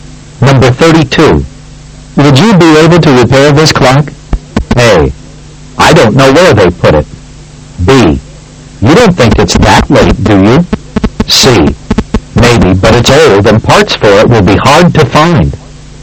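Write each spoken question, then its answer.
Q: Would you be able to repair this clock?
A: C: Maybe, but it's old and parts for it will be hard to find.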